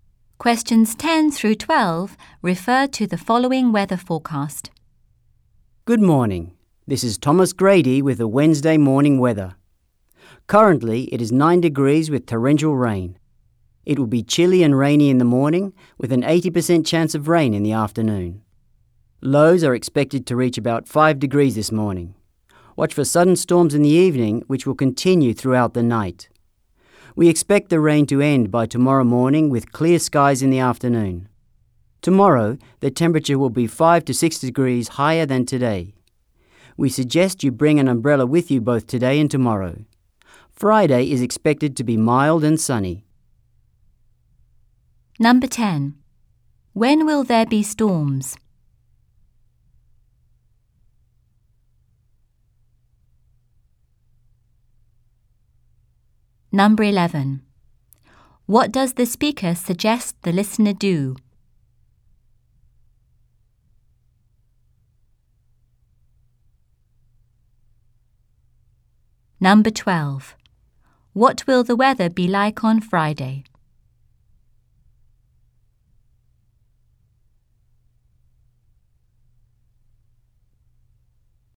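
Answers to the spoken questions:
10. In the evening and throughout the night
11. Bring an umbrella today and tomorrow
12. Mild and sunny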